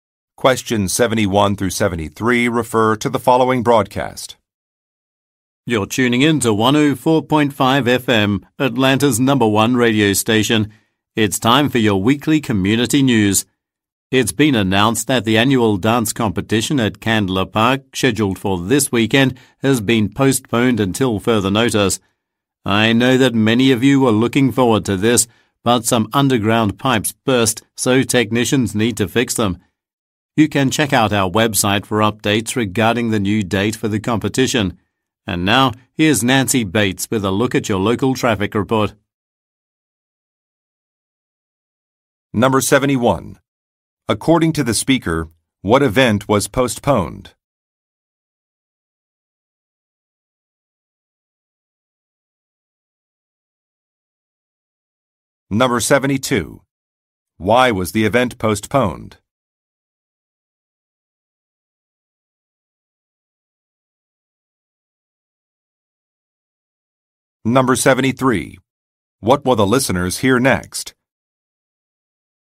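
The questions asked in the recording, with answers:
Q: According to the speaker, what event was postponed?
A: A dance competition

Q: Why was the event postponed?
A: Underground pipes burst and need repairs

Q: What will the listeners hear next?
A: A traffic report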